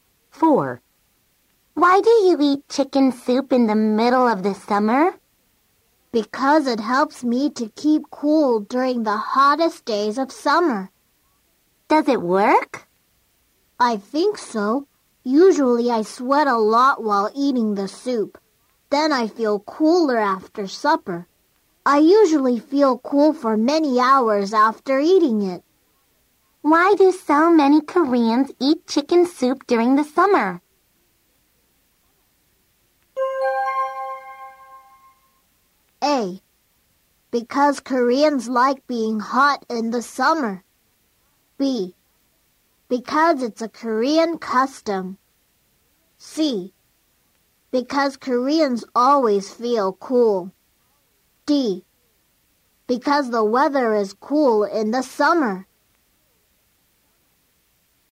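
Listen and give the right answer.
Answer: B: Because it's a Korean custom.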